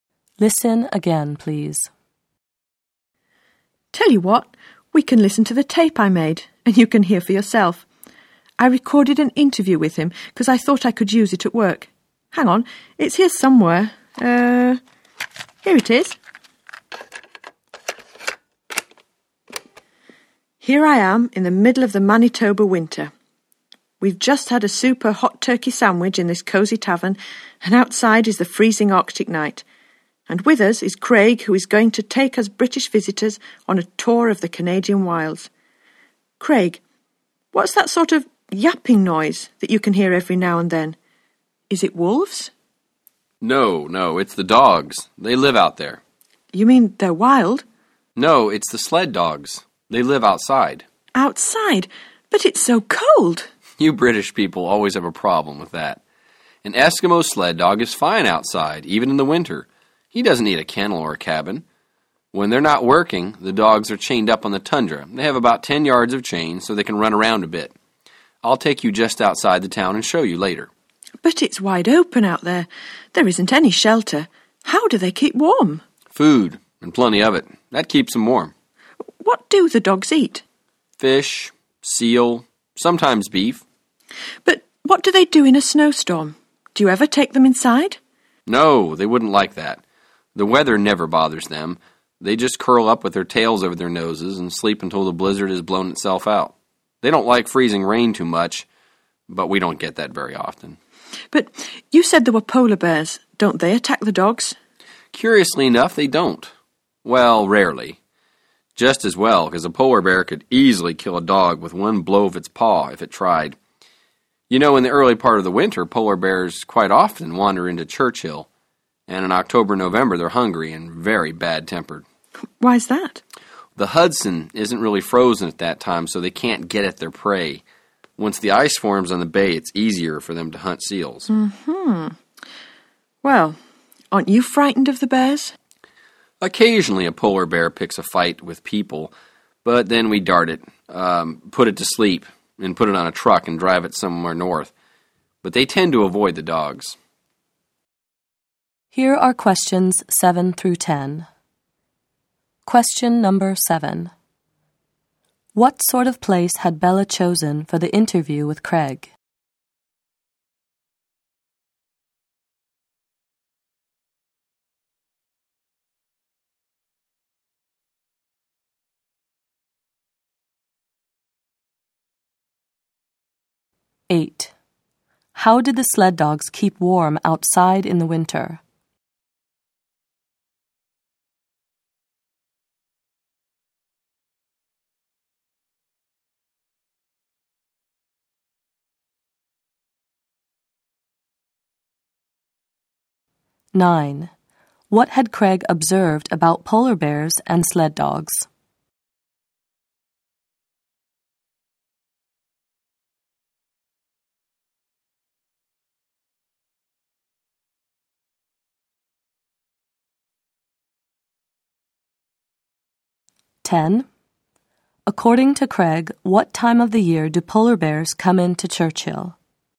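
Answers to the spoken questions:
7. A cosy tavern
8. By eating plenty of food
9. Polar bears rarely attack the dogs; they tend to avoid them
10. Early winter (October, November)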